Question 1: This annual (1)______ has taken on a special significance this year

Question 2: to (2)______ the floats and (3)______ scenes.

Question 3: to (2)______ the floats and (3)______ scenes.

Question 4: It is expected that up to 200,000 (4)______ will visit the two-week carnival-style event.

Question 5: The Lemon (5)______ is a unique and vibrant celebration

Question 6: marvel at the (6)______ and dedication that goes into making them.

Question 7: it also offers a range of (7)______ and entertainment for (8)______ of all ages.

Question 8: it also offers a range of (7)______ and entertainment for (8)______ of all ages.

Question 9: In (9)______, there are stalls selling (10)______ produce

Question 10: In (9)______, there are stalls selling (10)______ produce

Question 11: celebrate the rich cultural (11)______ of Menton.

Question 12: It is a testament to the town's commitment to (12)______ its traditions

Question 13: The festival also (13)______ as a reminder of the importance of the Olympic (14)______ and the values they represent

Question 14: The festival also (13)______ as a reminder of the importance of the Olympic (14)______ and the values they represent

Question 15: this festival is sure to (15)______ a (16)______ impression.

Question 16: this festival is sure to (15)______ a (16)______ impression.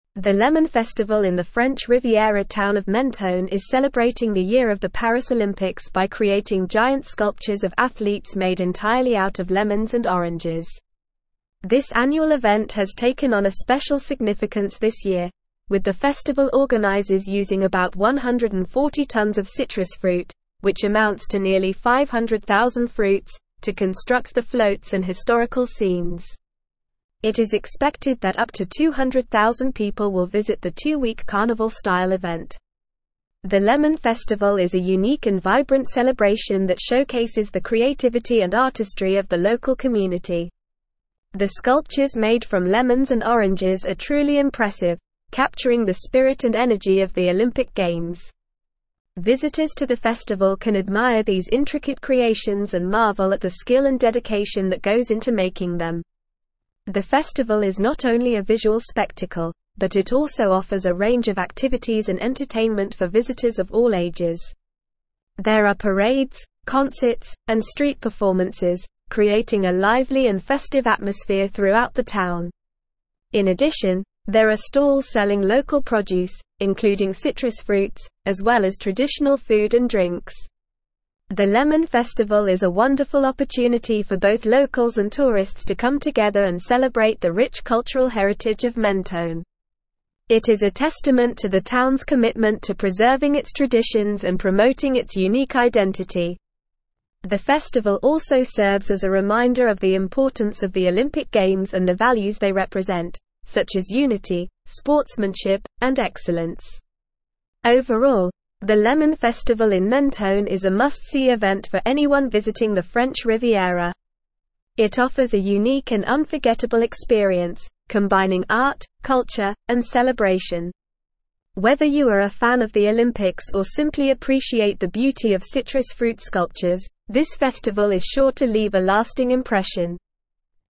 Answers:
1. event
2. construct
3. historical
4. people
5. Festival
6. skill
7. activities
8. visitors
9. addition
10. local
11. heritage
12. preserving
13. serves
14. Games
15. leave
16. lasting

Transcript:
The Lemon Festival in the French Riviera town of Menton is celebrating the year of the Paris Olympics by creating giant sculptures of athletes made entirely out of lemons and oranges. This annual event has taken on a special significance this year, with the festival organizers using about 140 tonnes of citrus fruit, which amounts to nearly 500,000 fruits, to construct the floats and historical scenes. It is expected that up to 200,000 people will visit the two-week carnival-style event.
The Lemon Festival is a unique and vibrant celebration that showcases the creativity and artistry of the local community. The sculptures made from lemons and oranges are truly impressive, capturing the spirit and energy of the Olympic Games. Visitors to the festival can admire these intricate creations and marvel at the skill and dedication that goes into making them.
The festival is not only a visual spectacle, but it also offers a range of activities and entertainment for visitors of all ages. There are parades, concerts, and street performances, creating a lively and festive atmosphere throughout the town. In addition, there are stalls selling local produce, including citrus fruits, as well as traditional food and drinks.
The Lemon Festival is a wonderful opportunity for both locals and tourists to come together and celebrate the rich cultural heritage of Menton. It is a testament to the town's commitment to preserving its traditions and promoting its unique identity. The festival also serves as a reminder of the importance of the Olympic Games and the values they represent, such as unity, sportsmanship, and excellence.
Overall, the Lemon Festival in Menton is a must-see event for anyone visiting the French Riviera. It offers a unique and unforgettable experience, combining art, culture, and celebration. Whether you are a fan of the Olympics or simply appreciate the beauty of citrus fruit sculptures, this festival is sure to leave a lasting impression.

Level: Level 4